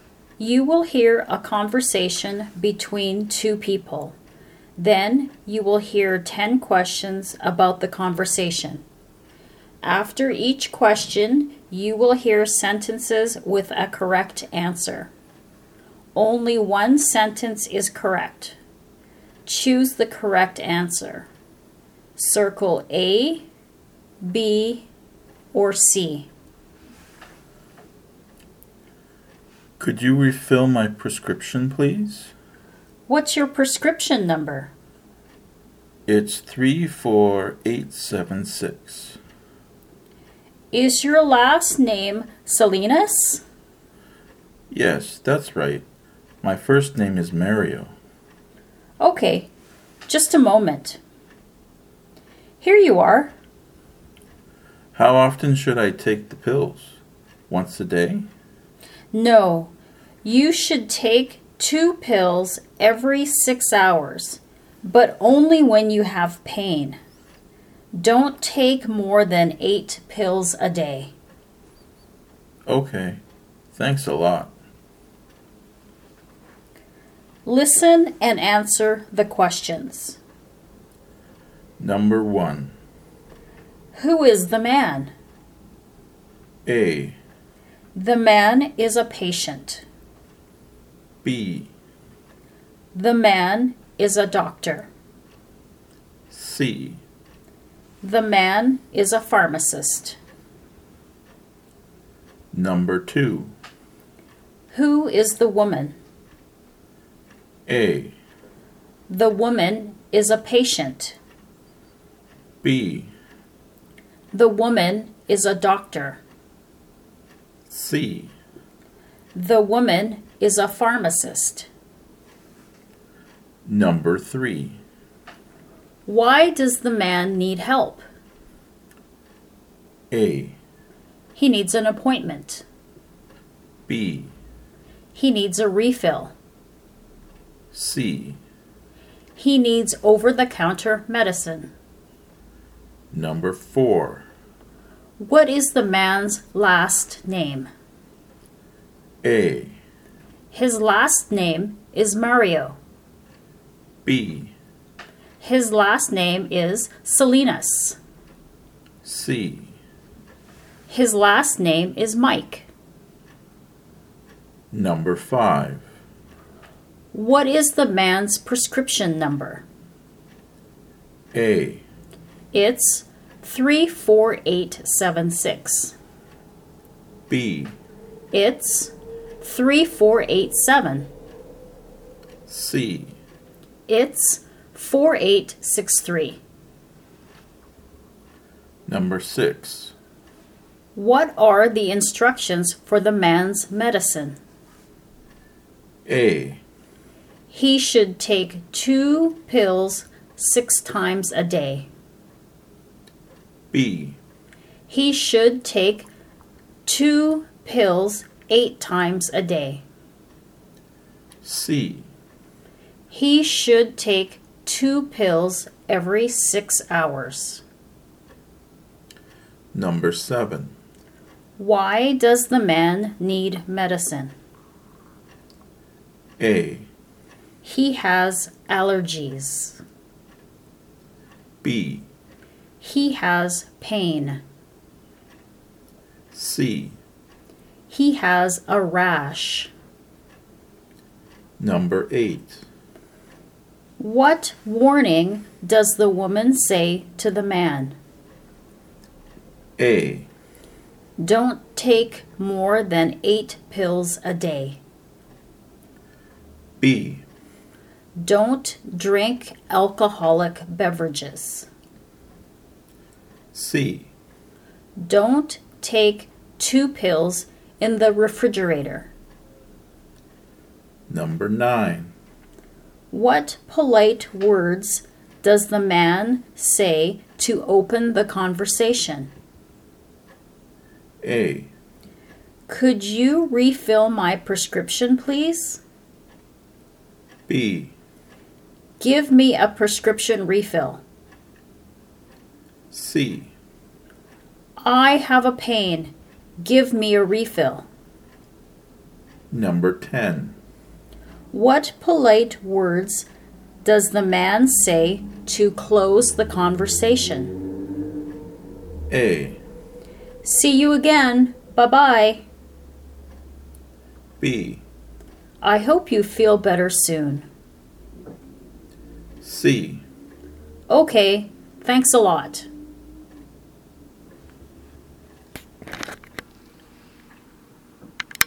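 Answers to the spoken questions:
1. A: The man is a patient.
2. C: The woman is a pharmacist.
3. B: He needs a refill.
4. B: His last name is Salinas.
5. A: It's 34876.
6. C: He should take 2 pills every 6 hours.
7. B: He has pain.
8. A: Don't take more than 8 pills a day.
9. A: Could you refill my prescription, please?
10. C: Okay, thanks a lot.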